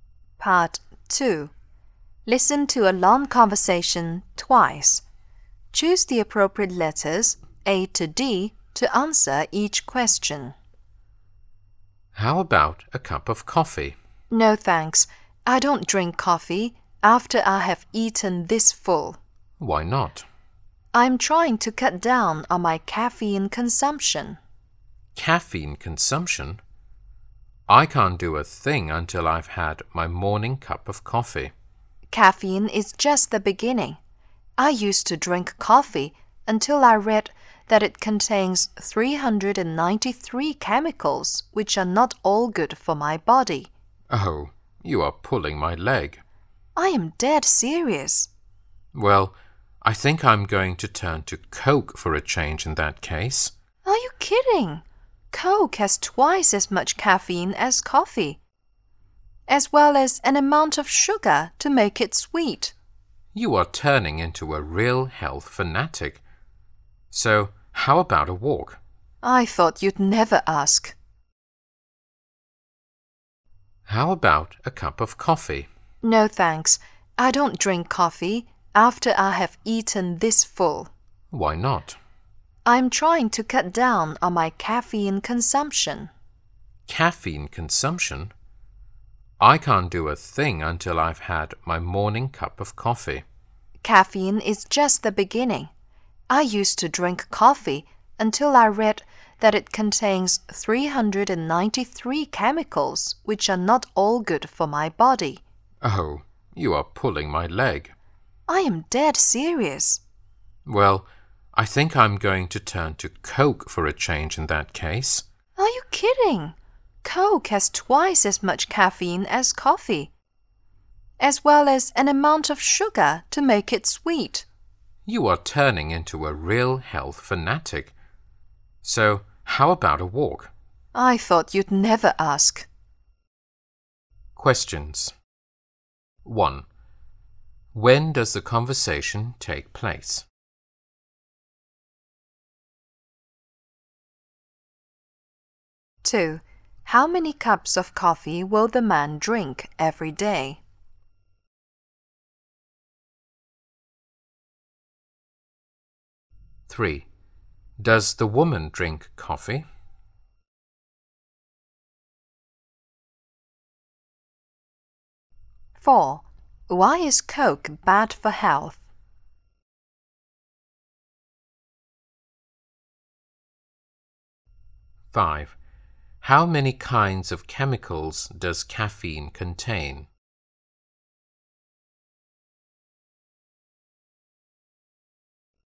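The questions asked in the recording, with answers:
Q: Does the woman drink coffee?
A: No

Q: Why is Coke bad for health?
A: It has twice as much caffeine as coffee and a lot of sugar

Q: How many kinds of chemicals does caffeine contain?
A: 393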